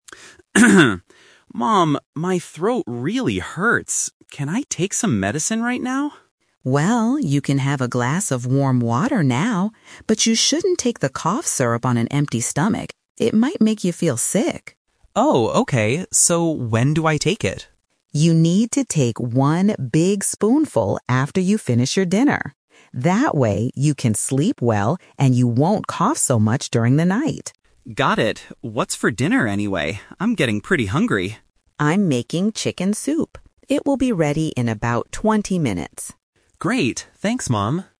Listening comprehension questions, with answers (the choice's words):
Listen to a conversation between a mother and her son. Choose the correct answer (A, B, or C) for each question.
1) What does the son want to do at the beginning of the conversation?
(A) Take some medicine.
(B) Drink warm water.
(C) Eat some chicken soup.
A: Take some medicine.

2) When exactly should the boy take the cough syrup?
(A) Right now.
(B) After he eats his dinner.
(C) When he wakes up in the night.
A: After he eats his dinner.

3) What is the mother doing right now?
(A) She is buying medicine.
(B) She is cooking dinner.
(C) She is going to sleep.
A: She is cooking dinner.

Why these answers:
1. At the beginning, the son asks, "Can I take some medicine right now?"
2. The mother clearly says, "You need to take one big spoonful after you finish your dinner."
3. The mother says, "I'm making chicken soup. It will be ready in about twenty minutes." Making soup means she is cooking dinner.

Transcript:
Son: Mom, my throat really hurts. Can I take some medicine right now?
Mother: Well, you can have a glass of warm water now. But you shouldn't take the cough syrup on an empty stomach. It might make you feel sick.
Son: Oh, okay. So when do I take it?
Mother: You need to take one big spoonful after you finish your dinner. That way, you can sleep well and you won't cough so much during the night.
Son: Got it. What's for dinner, anyway? I'm getting pretty hungry.
Mother: I'm making chicken soup. It will be ready in about twenty minutes.